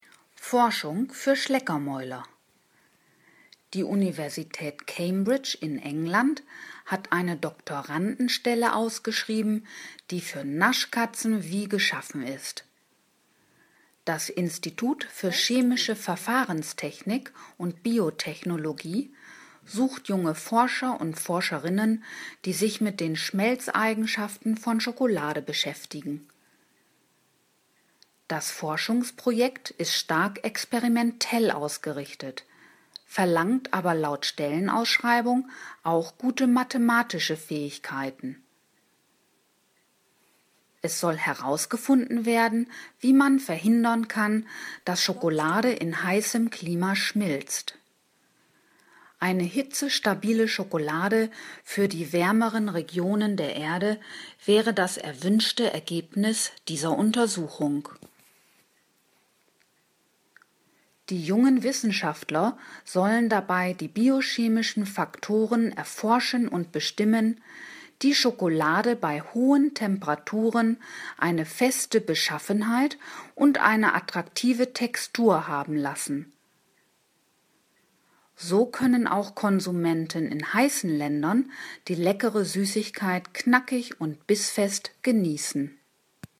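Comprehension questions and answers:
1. An der Universität Oxford wird eine Doktorandenstelle im Institut für Chemische Verfahrenstechnik und Biotechnologie ausgeschrieben.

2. Die jungen Forscher sollen sich mit den Schmelzeigenschaften von Schokolade beschäftigen.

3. Das Forschungsprojekt ist nicht experimentell, sondern theoretisch ausgerichtet, verlangt aber keine besonderen mathematischen Kenntnisse.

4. Die Doktoranden müssen täglich mehrere Tafeln Schokolade essen.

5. Das Ziel der Forschung ist es, eine hitze-stabile, nicht schmelzende Schokolade für heiße Regionen der Erde herstellen zu können.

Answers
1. falsch
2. richtig
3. falsch
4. falsch
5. richtig

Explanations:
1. Die Stelle ist vom gleichnamigen Institut der Universität Cambridge ausgeschrieben.
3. Es ist stark experimentell ausgerichtet und erfordert gute mathematische Kenntnisse.
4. Der Text sagt darüber nichts.

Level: B (mittel)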